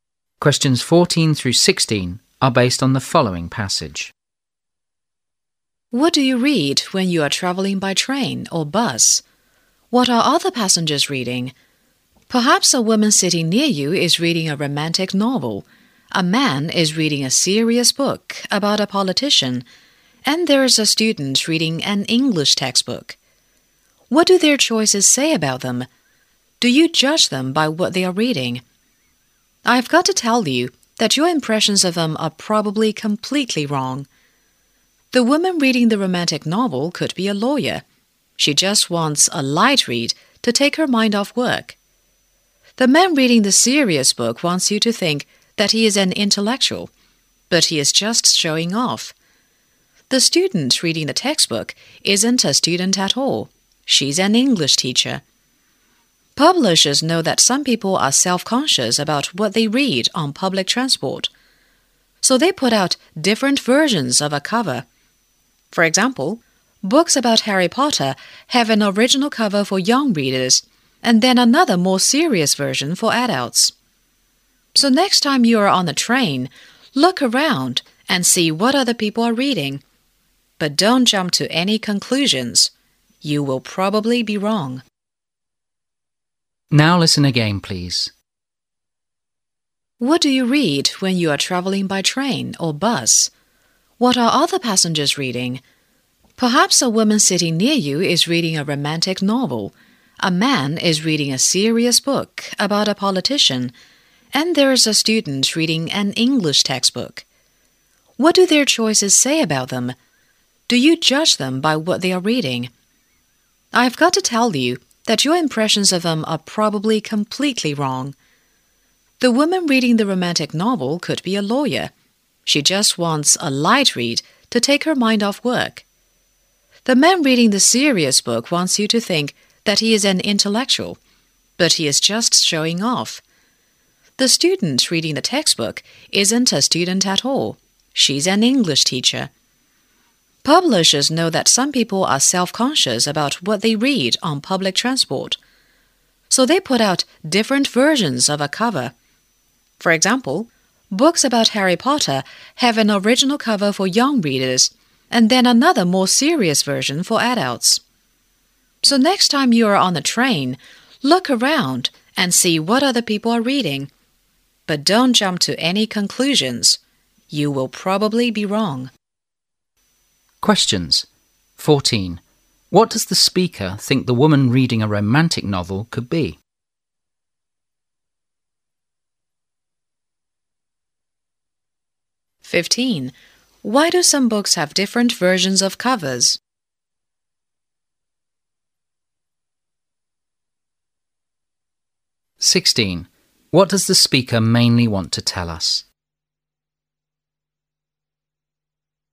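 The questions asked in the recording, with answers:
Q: What does the speaker think the woman reading a romantic novel could be?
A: A lawyer

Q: Why do some books have different versions of covers?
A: Because some people are self-conscious about what they read on public transport

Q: What does the speaker mainly want to tell us?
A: Don't judge people by what they read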